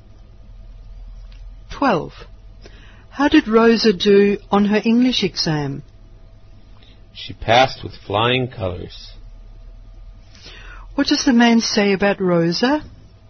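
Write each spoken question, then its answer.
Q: What does the man say about Rosa?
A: She passed her English exam easily and very well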